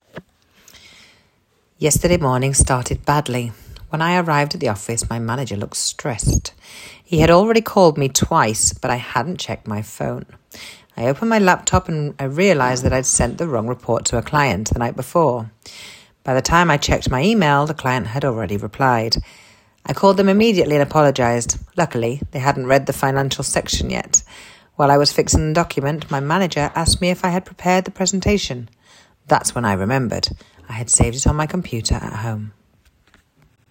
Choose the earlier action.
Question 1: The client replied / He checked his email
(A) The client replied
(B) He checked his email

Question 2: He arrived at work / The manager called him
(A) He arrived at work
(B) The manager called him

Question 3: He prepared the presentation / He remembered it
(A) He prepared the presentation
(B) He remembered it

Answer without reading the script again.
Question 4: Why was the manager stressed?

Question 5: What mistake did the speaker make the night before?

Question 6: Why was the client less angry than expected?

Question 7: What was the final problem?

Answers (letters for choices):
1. A
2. B
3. A
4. He hadn't answered his phone and had sent the wrong report
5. He sent the wrong report
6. They hadn't read the financial section
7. The presentation was at home

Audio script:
When I arrived at the office, my manager looked stressed.
He had already called me twice, but I hadn't seen my phone.
I opened my laptop and realised I had sent the wrong report to a client the night before.
By the time I checked my email, the client had already replied.
I immediately called them and apologised.
Luckily, they hadn't read the financial section yet.